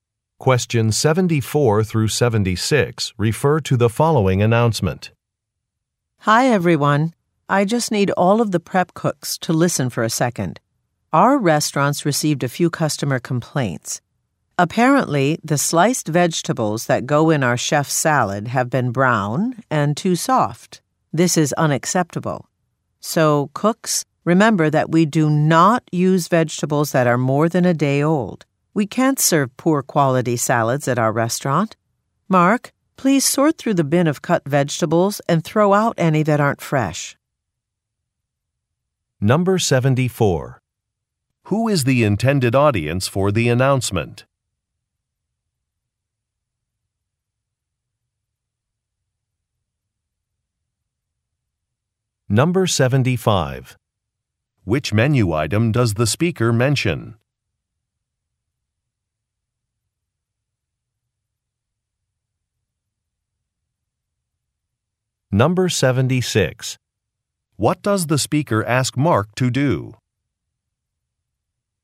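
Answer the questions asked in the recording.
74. Prep cooks
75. The chef's salad
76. Throw out vegetables that aren't fresh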